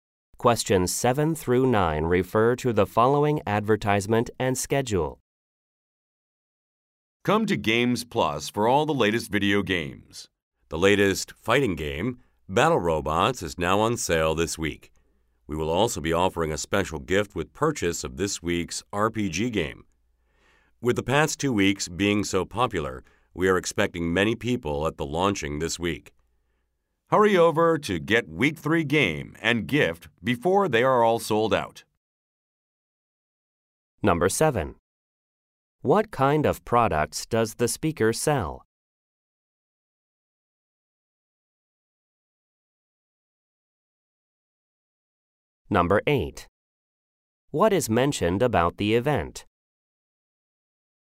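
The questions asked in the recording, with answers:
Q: What kind of products does the speaker sell?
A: Video games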